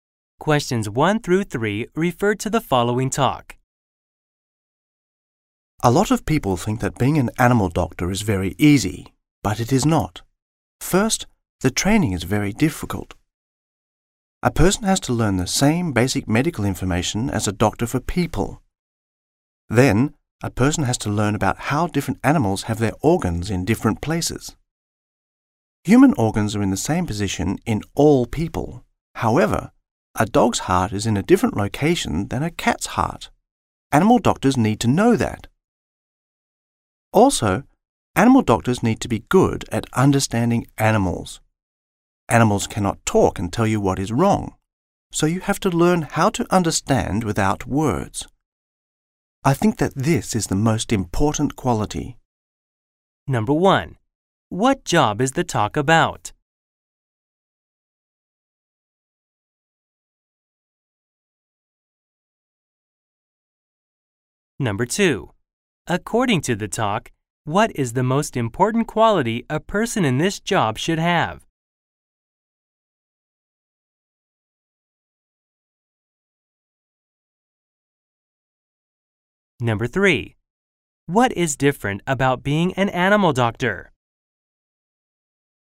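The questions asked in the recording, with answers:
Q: What job is the talk about?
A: Animal doctor

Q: According to the talk, what is the most important quality a person in this job should have?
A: Being good at understanding animals without words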